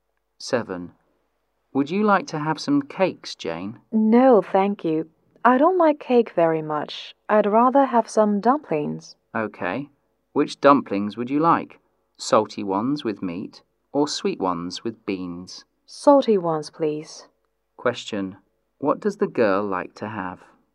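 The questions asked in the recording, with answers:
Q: What does the girl like to have?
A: Salty dumplings with meat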